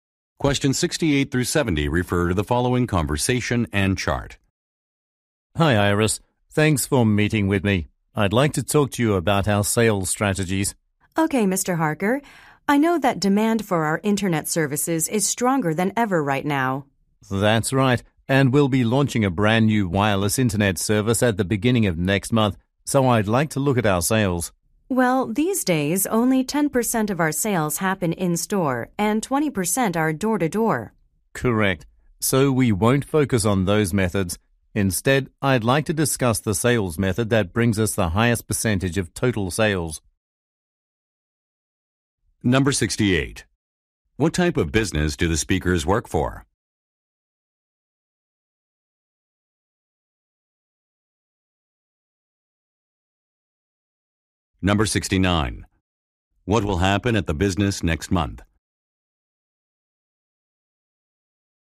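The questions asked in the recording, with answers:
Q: What type of business do the speakers work for?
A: An internet service provider

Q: What will happen at the business next month?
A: A new wireless internet service will launch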